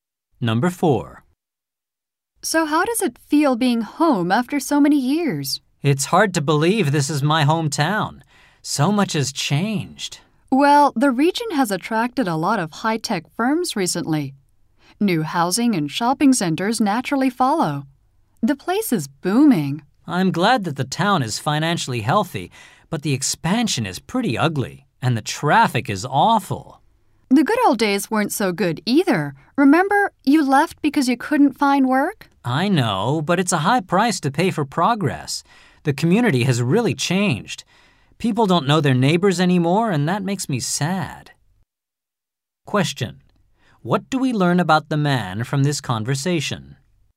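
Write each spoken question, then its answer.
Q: What do we learn about the man from this conversation?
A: He is sad that his hometown's community has changed and people no longer know their neighbors.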